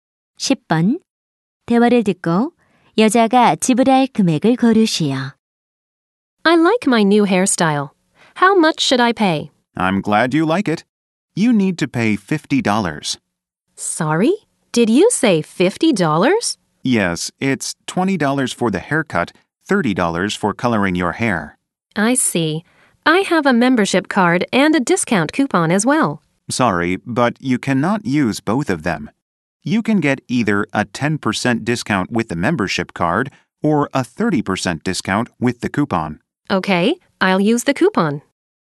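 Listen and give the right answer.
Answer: 35달러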